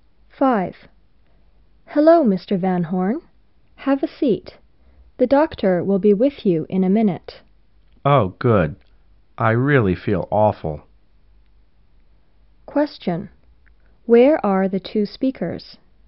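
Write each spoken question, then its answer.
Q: Question. Where are the two speakers?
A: In a doctor's office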